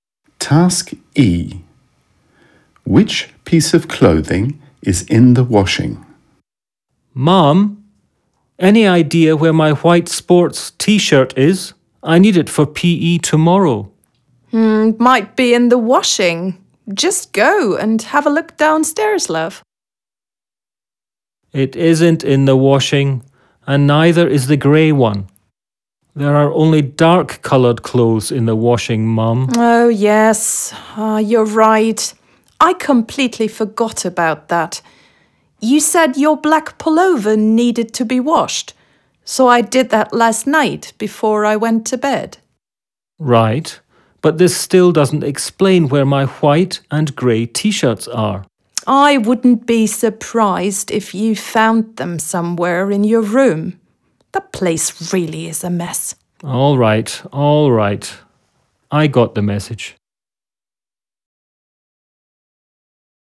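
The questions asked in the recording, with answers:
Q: Which piece of clothing is in the washing?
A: His black pullover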